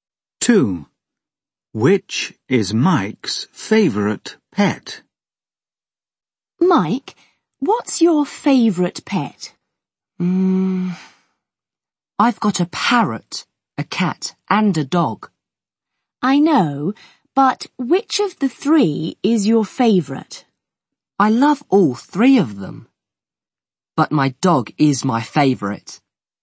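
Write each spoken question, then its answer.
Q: Which is Mike's favourite pet?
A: His dog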